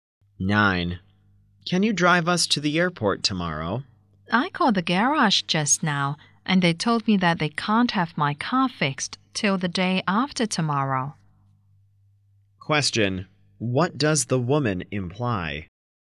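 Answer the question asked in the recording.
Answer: She can't drive them to the airport because her car is being repaired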